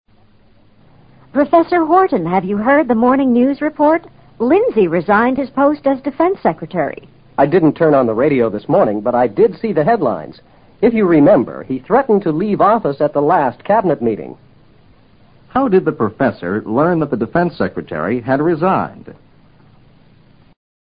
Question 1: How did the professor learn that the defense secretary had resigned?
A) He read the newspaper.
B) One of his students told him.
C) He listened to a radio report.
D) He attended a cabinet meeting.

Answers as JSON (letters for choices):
{"1": "A"}

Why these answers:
答案是依据I did see the headlines做出的结论。Headlines指报纸的大字标题,或指新闻广播的摘要。此处只能是前者(see the headlines)。resign:辞职。defense secretary: 国防部长。threaten to leave office: 威胁说要辞职不干。cabinet meeting: 内阁成员会议。